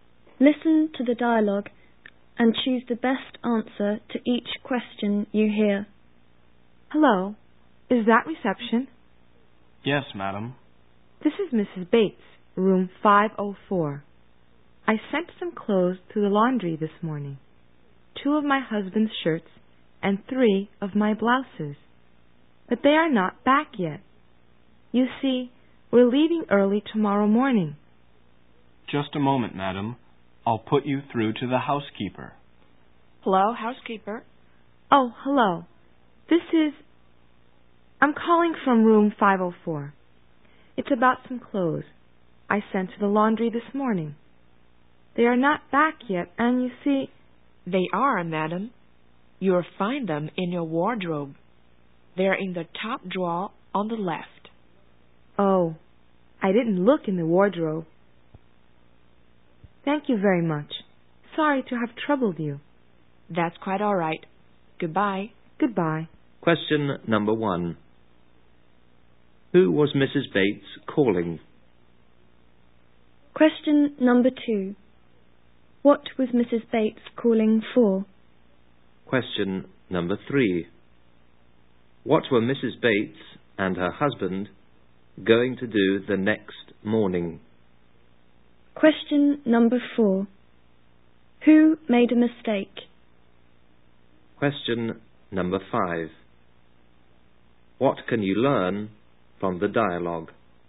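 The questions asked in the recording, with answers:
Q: Who was Mrs. Bates calling?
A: Reception (then the housekeeper)

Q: What was Mrs. Bates calling for?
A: Her laundry was not back yet

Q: What were Mrs. Bates and her husband going to do the next morning?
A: Leave early

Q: Who made a mistake?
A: Mrs. Bates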